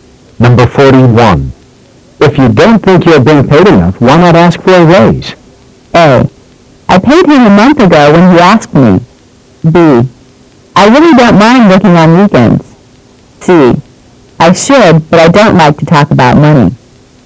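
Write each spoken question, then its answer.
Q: If you don't think you're being paid enough, why not ask for a raise?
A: C: I should, but I don't like to talk about money.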